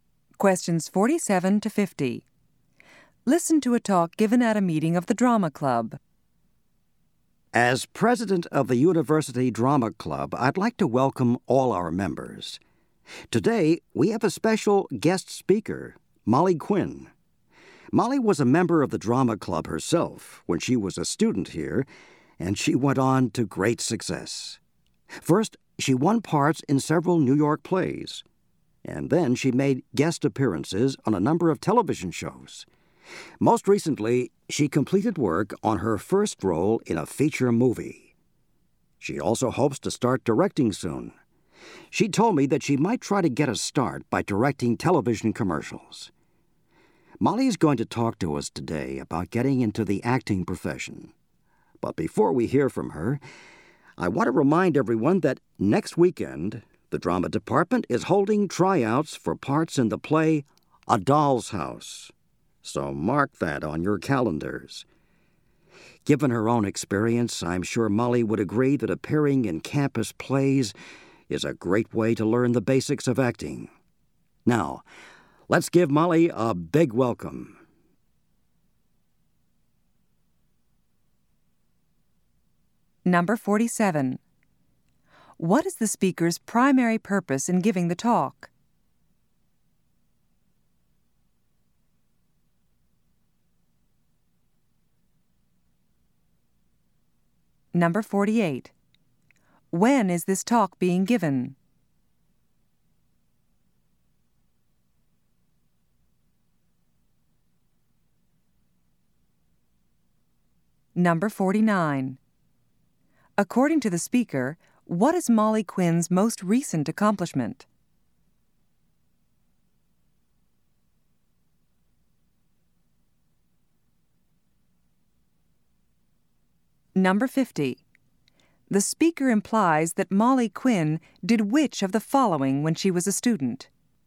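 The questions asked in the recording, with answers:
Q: What is the speaker's primary purpose in giving the talk?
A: To introduce a guest speaker

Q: According to the speaker, what is Molly Quinn's most recent accomplishment?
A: Completing her first role in a feature movie

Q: The speaker implies that Molly Quinn did which of the following when she was a student?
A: She appeared in campus plays.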